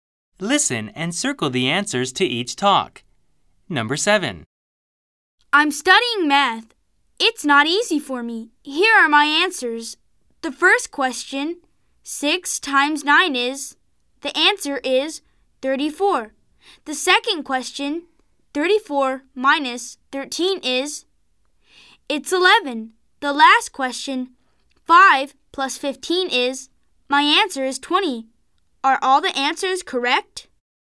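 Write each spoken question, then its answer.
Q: Are all the answers correct?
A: No, 6 times 9 is 54 and 34 minus 13 is 21; only 5 plus 15 is 20 is correct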